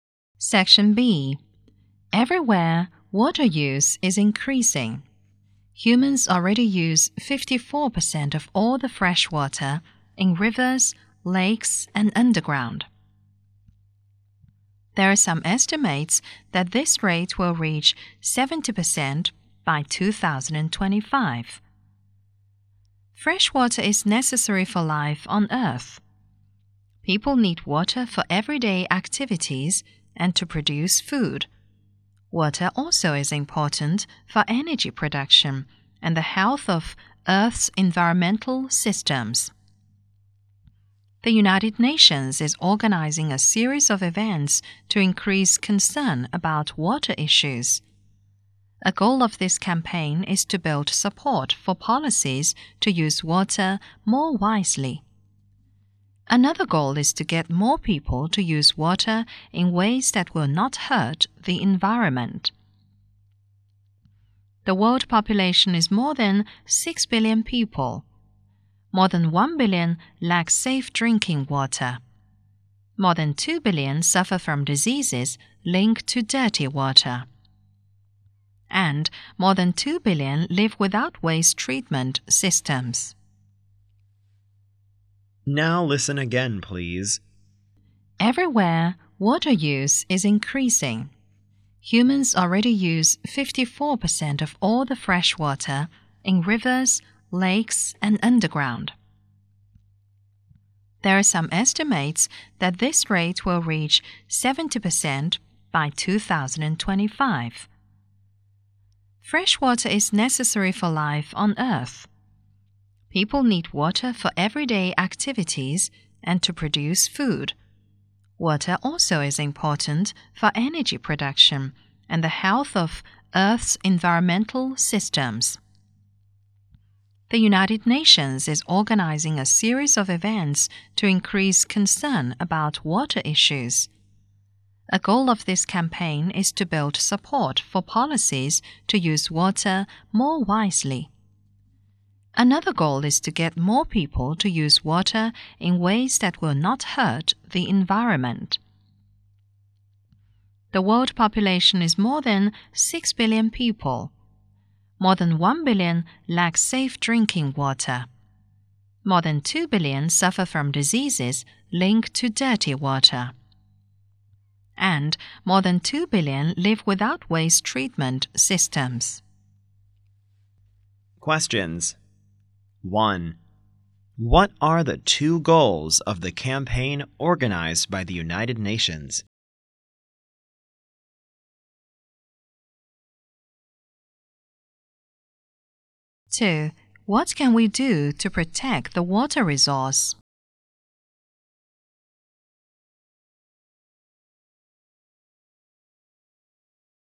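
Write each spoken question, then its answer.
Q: What are the 2 goals of the campaign organized by the United Nations?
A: To build support for policies to use water more wisely, and to get more people to use water in ways that will not hurt the environment.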